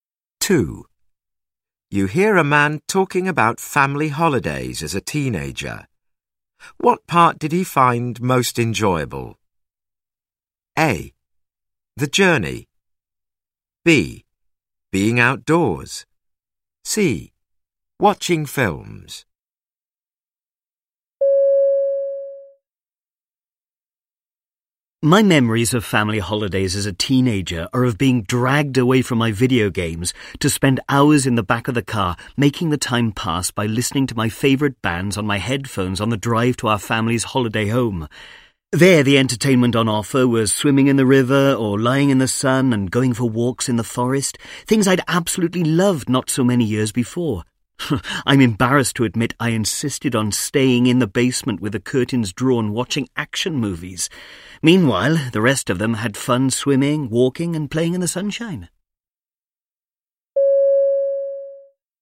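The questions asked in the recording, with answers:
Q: What part did he find most enjoyable?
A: C: Watching films.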